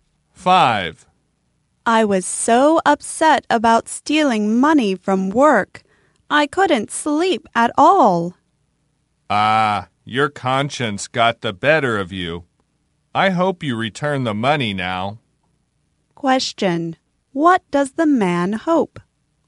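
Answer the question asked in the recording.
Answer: That she will return the money now.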